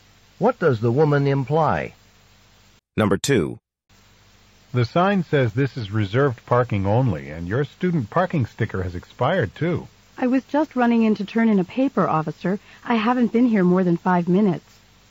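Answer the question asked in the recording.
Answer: She parked in a reserved spot for only a few minutes to hand in a paper.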